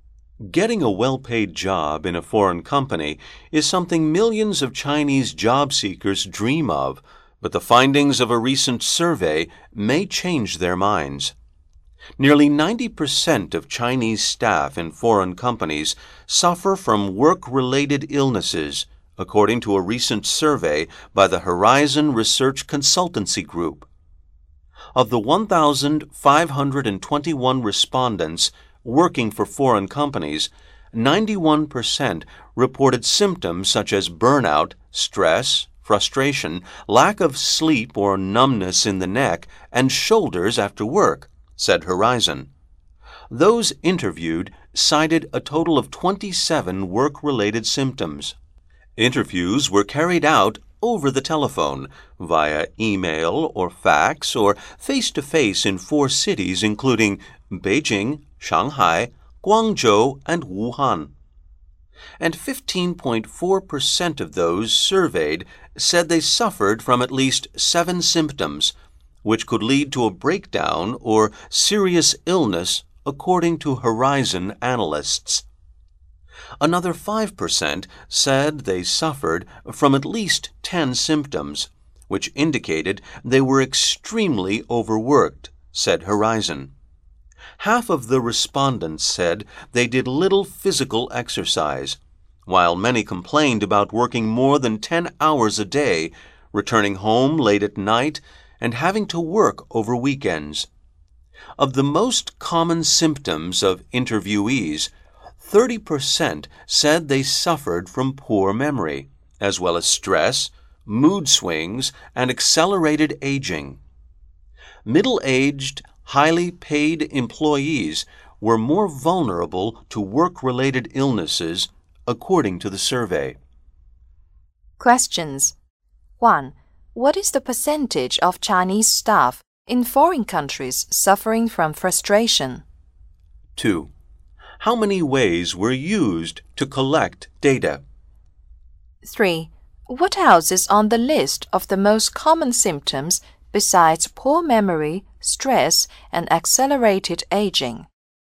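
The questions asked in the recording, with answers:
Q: What else is on the list of the most common symptoms besides poor memory, stress, and accelerated aging?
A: Mood swings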